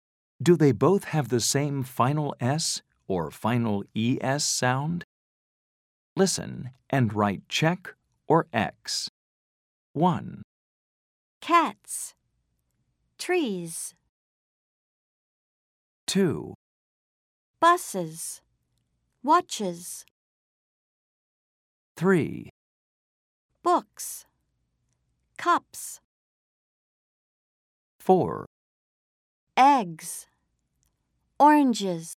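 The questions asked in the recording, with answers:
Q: Cats. Trees.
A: X (different: /s/ vs /z/)

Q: Buses. Watches.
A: check (same: /iz/)

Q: Books. Cups.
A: check (same: /s/)

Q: Eggs. Oranges.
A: X (different: /z/ vs /iz/)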